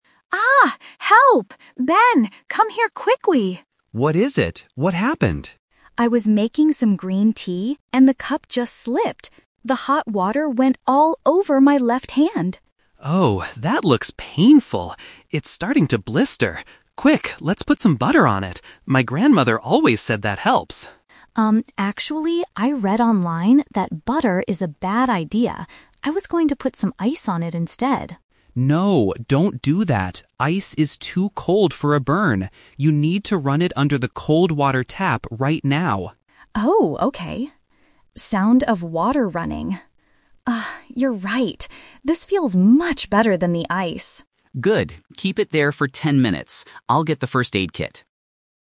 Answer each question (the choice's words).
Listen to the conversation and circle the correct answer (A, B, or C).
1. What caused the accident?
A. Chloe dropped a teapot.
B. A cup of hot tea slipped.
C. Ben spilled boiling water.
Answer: A cup of hot tea slipped.

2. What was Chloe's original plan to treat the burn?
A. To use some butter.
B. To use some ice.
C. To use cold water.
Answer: To use some ice.

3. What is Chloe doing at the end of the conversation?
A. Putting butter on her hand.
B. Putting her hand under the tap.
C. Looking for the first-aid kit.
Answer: Putting her hand under the tap.

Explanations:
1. Chloe says, "the cup just slipped. The hot water went all over my left hand." Option (A) is not mentioned, and (C) is a trap because Ben is the one helping, not the one who caused it.
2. This is a "Trap" question. Ben suggests butter first (Option A - Trap), but Chloe says, "I was going to put some ice on it instead." This shows her original intention.
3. Although ice and butter were mentioned, Ben advises using the cold water tap. Chloe agrees and the sound of running water confirms she is doing it. Option (C) is a trap because Ben (not Chloe) says he will get the first-aid kit.

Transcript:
Roommate 1 (Chloe): Aaaaah! Help! Ben, come here quickly!
Roommate 2 (Ben): What is it? What happened?
Chloe: I was making some green tea and the cup just slipped. The hot water went all over my left hand!
Ben: Oh, that looks painful! It's starting to blister. Quick, let's put some butter on it. My grandmother always said that helps.
Chloe: Um, actually, I read online that butter is a bad idea. I was going to put some ice on it instead.
Ben: No, don't do that! Ice is too cold for a burn. You need to run it under the cold water tap right now.
Chloe: Oh, okay. Sound of water running ... Ah, you're right. This feels much better than the ice.
Ben: Good. Keep it there for ten minutes. I'll get the first-aid kit.